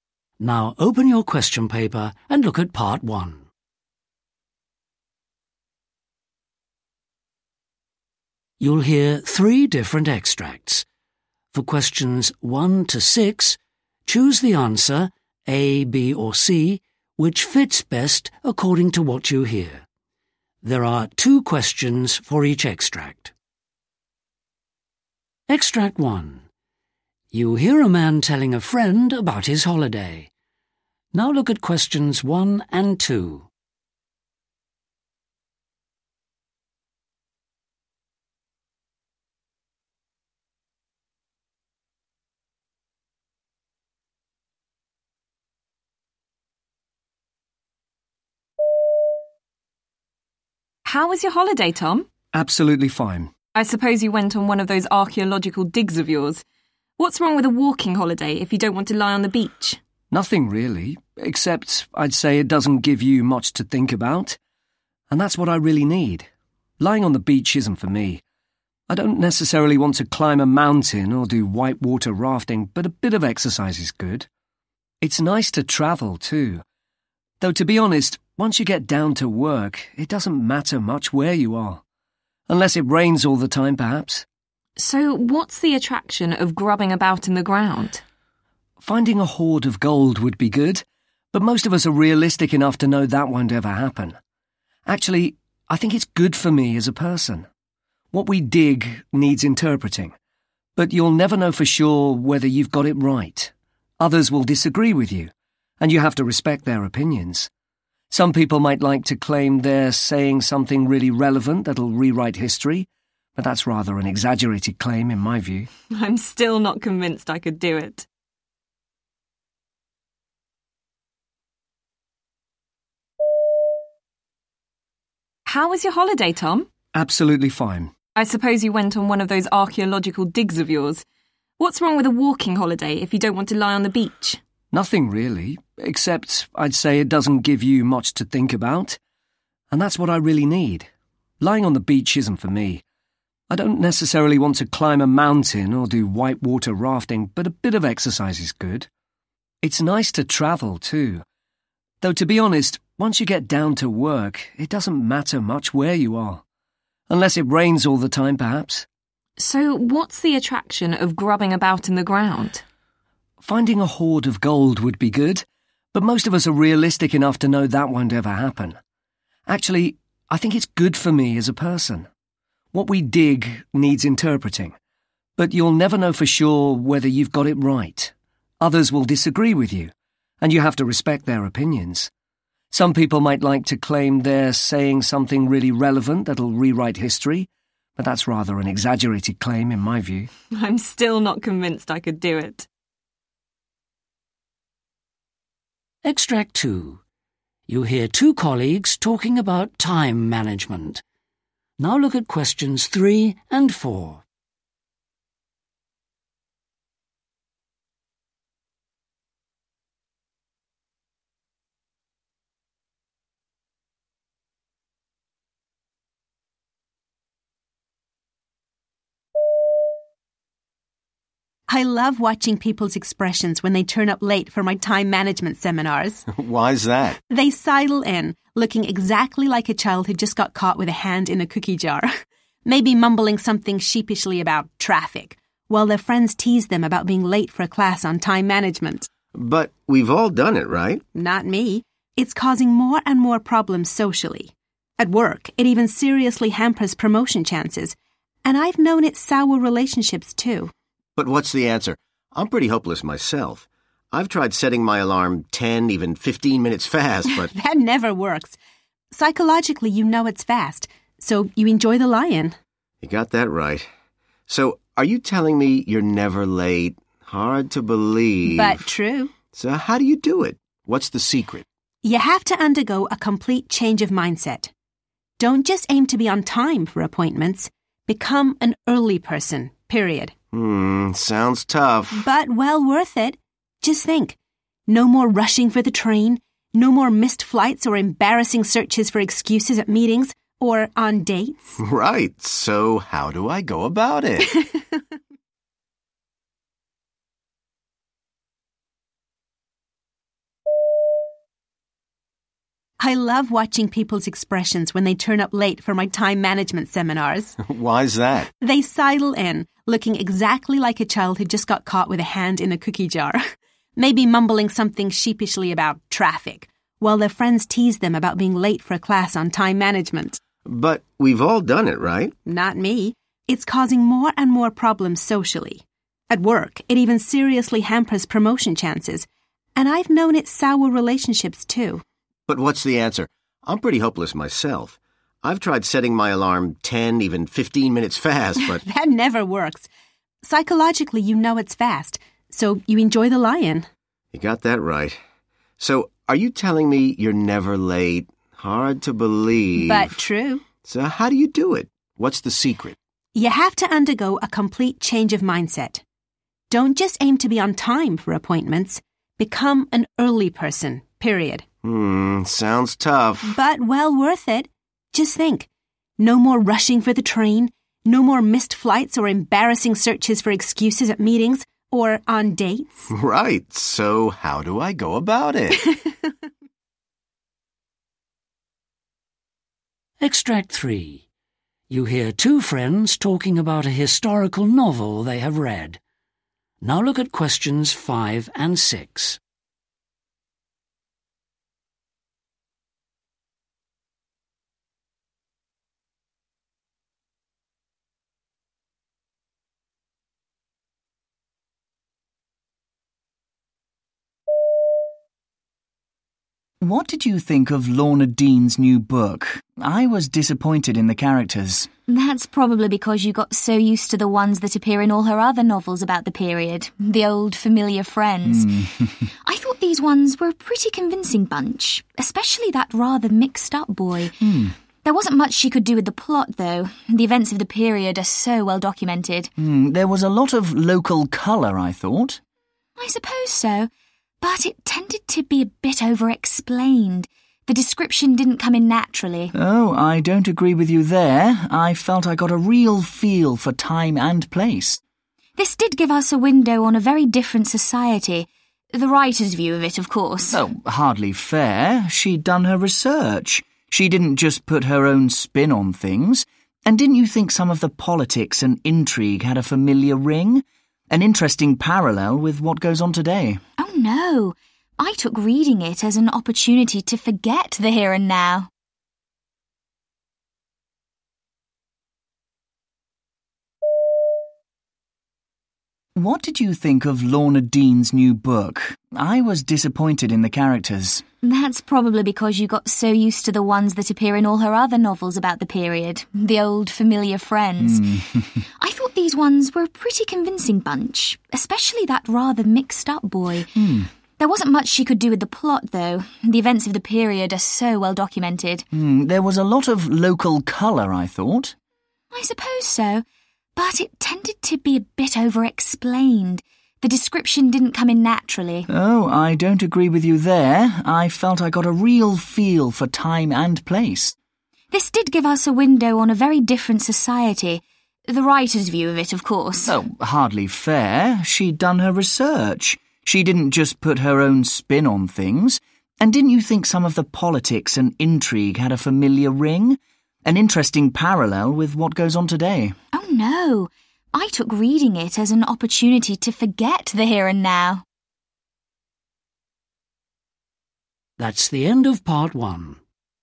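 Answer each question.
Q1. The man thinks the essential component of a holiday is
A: something to think about

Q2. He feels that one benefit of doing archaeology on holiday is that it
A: teaches him to respect other people's opinions

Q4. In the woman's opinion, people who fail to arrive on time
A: need a complete change of mindset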